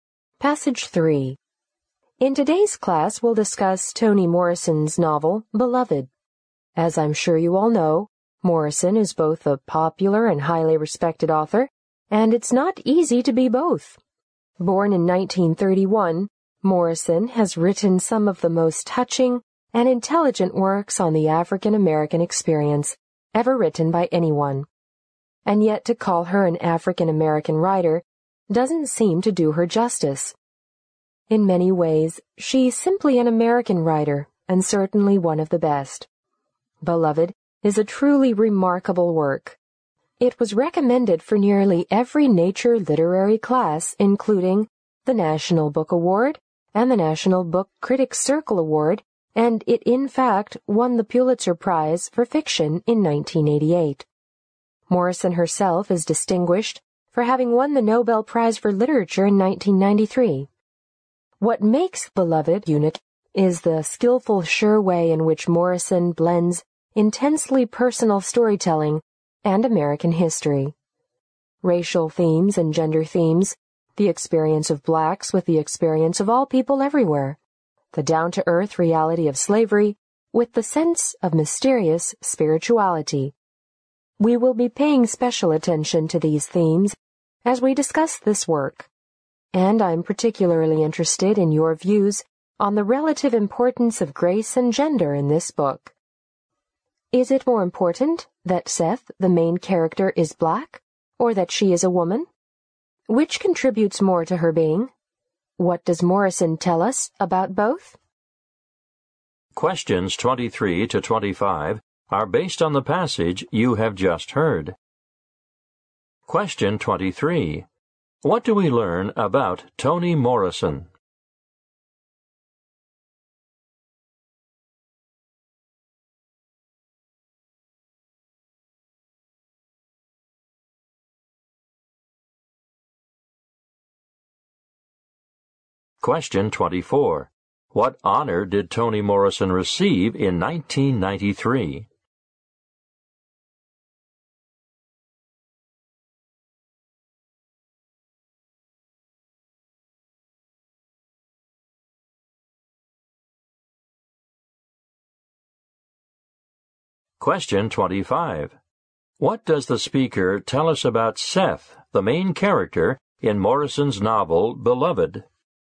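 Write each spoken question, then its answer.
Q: What do we learn about Toni Morrison?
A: She is both a popular and highly respected author

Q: What honor did Toni Morrison receive in 1993?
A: The Nobel Prize for Literature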